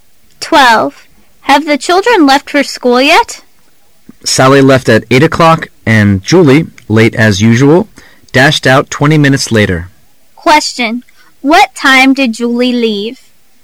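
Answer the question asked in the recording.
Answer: 8:20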